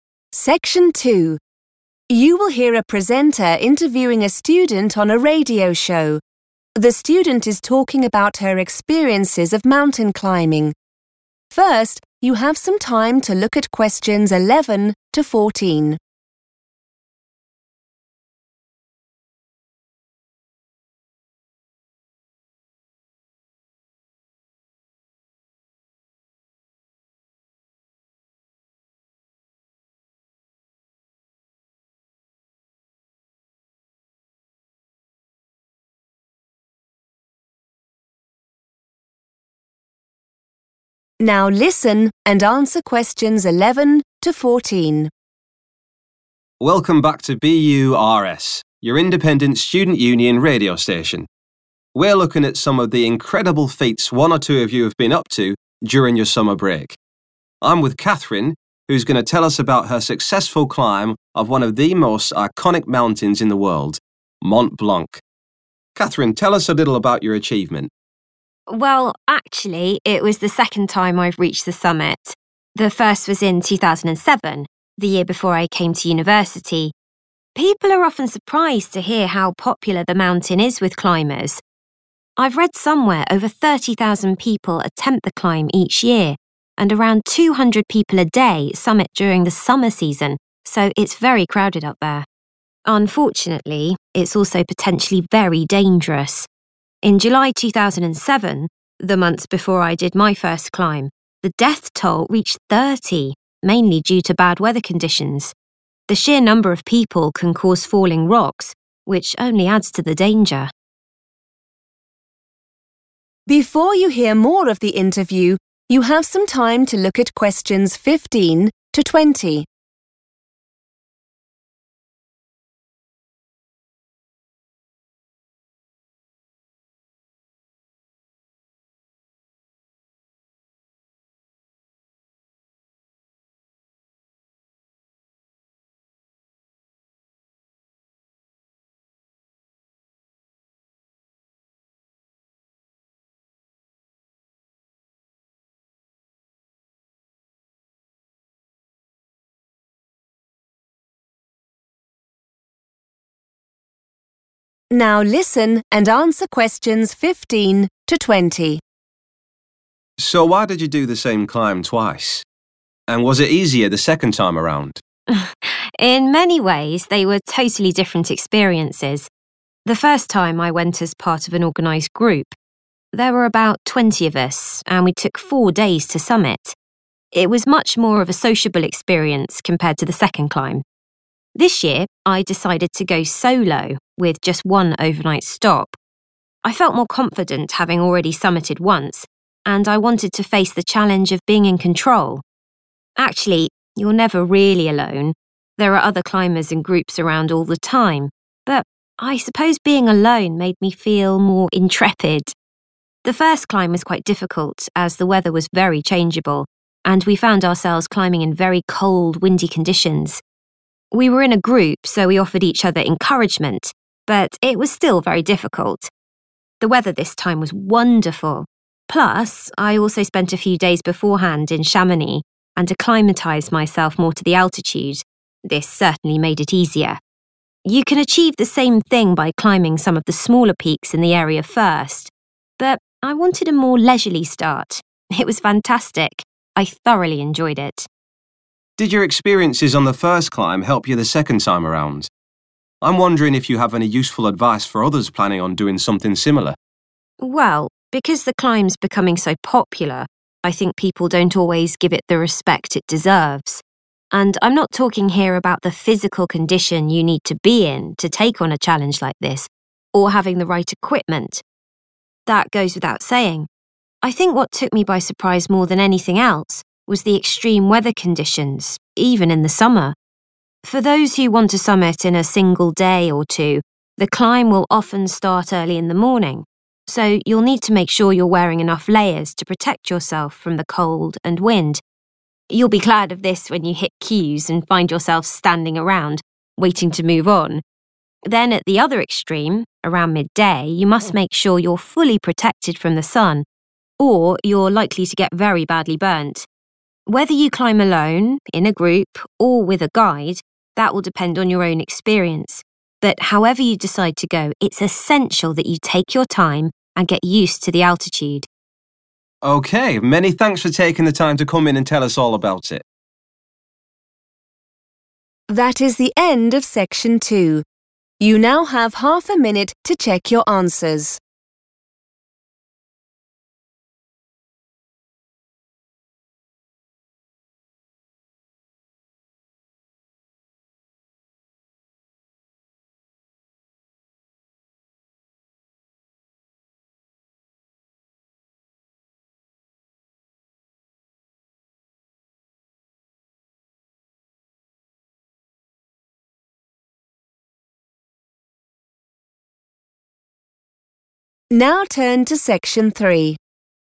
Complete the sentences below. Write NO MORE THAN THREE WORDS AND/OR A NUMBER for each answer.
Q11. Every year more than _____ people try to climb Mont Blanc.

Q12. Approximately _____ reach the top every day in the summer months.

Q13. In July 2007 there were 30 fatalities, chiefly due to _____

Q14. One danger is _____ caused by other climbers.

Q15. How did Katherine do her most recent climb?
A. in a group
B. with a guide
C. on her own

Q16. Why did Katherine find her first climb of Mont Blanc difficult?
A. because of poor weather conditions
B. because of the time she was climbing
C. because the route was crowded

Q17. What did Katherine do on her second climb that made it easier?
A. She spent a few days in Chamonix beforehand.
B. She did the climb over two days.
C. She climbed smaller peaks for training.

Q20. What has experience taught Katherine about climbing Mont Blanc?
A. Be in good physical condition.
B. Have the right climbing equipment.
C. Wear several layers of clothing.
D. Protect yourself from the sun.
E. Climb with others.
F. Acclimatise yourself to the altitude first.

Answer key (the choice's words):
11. 30,000 / 30000
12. 200
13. bad weather conditions / bad weather
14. falling rocks
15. on her own
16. because of poor weather conditions
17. She spent a few days in Chamonix beforehand.
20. Wear several layers of clothing.

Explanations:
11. The correct answer is supported by Katherine's statement about how many people try to climb Mont Blanc. She mentions she read that more than 30,000 people attempt it every year. In this context, 'attempt' is a synonym for 'try', and 'each year' means the same as 'every year'.
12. The correct answer is 200 because Katherine mentions that around this specific number of people summit each day in the summer months. In this context, to "summit" means to reach the highest point or the top of the mountain. The task asks for the number of people who "reach the top," which matches Katherine's information.
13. The correct answer is supported by the speaker's mention of a specific time (July 2007) when 30 people died. She uses the phrase 'mainly due to', which is a synonym for 'chiefly due to' in the task, to introduce 'bad weather conditions' as the cause. The term 'death toll' in the transcript corresponds to 'fatalities' in the sentence.
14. The correct answer is "falling rocks" because the speaker identifies this as a specific risk linked to the high volume of people on the mountain. In this context, the "sheer number of people" acts as a synonym for "other climbers." The transcript explicitly connects the presence of many people to the creation of this hazard, which increases the overall danger of the climb.
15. The correct answer is 'on her own' because Katherine explains that she decided to go 'solo' for her second trip. The word 'solo' means doing something alone. She wanted to test herself by being 'in control' of the climb. While her first climb was a 'sociable experience' with 20 people, this most recent one was a personal challenge where she did not use a guide or a group.
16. The correct answer is A because Katherine describes her first experience as 'quite difficult' specifically because of how the weather was. She explains that it was 'very changeable' (meaning it changed a lot) and they dealt with 'very cold, windy conditions.' Although she mentions that the mountain is crowded, she connects the difficulty of her climb directly to the poor weather rather than the number of people. Keywords: difficult, weather, changeable, cold, windy.
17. The correct answer is A because Katherine explains that her second climb felt easier because she spent time getting her body ready for the high mountain height. She mentions that she stayed in Chamonix for a few days to 'acclimatise,' which means to help her body get used to the thin air at high 'altitude.' She explicitly says that this preparation 'certainly made it easier.' While she mentions that climbing smaller peaks is another way people train, she says she preferred her 'leisurely' start in Chamonix instead.
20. The correct answer is C, D, and F because Katherine provides specific advice based on the surprises and successes of her two climbs. She mentions that spending time in Chamonix to 'acclimatised' himself before the climb made the experience much easier (F). Regarding clothing and safety, she notes that mornings are very cold and windy, requiring many 'layers' (C), while the midday sun is extremely strong and can cause you to get 'badly burnt' (D) if you are not protected. While she acknowledges that physical fitness and gear (A and B) are necessary, she explains that those requirements are already obvious and focus her actual advice on managing the weather and the altitude.

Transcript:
We're looking at some of the incredible feats one or two of you have been up to during your summer break. I'm with Katherine who's going to tell us about her successful climb of one of the most iconic mountains in the world - Mont Blanc. Katherine, tell us a little about your achievement.
Katherine: Well, actually it was the second time I've reached the summit - the first was in 2007, the year before I came to university. People are often surprised to hear how popular the mountain is with climbers - I've read somewhere over 30,000 people attempt the climb each year and around 200 people a day summit during the summer season so it's very crowded up there. Unfortunately it's also potentially very dangerous. In July 2007, the month before I did my first climb, the death toll reached 30, mainly due to bad weather conditions. The sheer number of people can cause falling rocks, which only adds to the danger.
Presenter: So why did you do the same climb twice? And was it easier the second time around?
Katherine: In many ways they were totally different experiences. The first time I went as part of an organised group. There were about 20 of us and we took four days to summit. It was much more of a sociable experience compared to the second climb. This year I decided to go solo with just one overnight stop. I felt more confident having already summited once and I wanted to face the challenge of being in control. Actually, you're never really alone - there are other climbers and groups around all the time but I suppose being alone made me feel more intrepid. The first climb was quite difficult as the weather was very changeable and we found ourselves climbing in very cold, windy conditions. We were in a group so we offered each other encouragement but it was still very difficult. The weather this time was wonderful. Plus I also spent a few days beforehand in Chamonix and acclimatised myself more to the altitude - this certainly made it easier. You can achieve the same thing by climbing some of the smaller peaks in the area first but I wanted a more leisurely start. It was fantastic, I thoroughly enjoyed it.
Presenter: Did your experiences on the first climb help you the second time around? I'm wondering if you have any useful advice for others planning on doing something similar.
Katherine: Well, because the climb's becoming so popular I think people don't always give it the respect it deserves. And I'm not talking here about the physical condition you need to be in to take on a challenge like this or having the right equipment. That goes without saying. I think what took me by surprise more than anything else was the extreme weather conditions, even in the summer. For those who want to summit in a single day or two the climb will often start early in the morning so you'll need to make sure you're wearing enough layers to protect yourself from the cold and wind. You'll be glad of this when you hit queues and find yourself standing around waiting to move on. Then at the other extreme around midday you must make sure you're fully protected from the sun or you're likely to get very badly burnt. Whether you climb alone, in a group or a with a guide, that will depend on your own experience but however you decide to go it's essential that you take your time and get used to the altitude.
Presenter: Okay, many thanks for taking the time to come in and tell us all about it!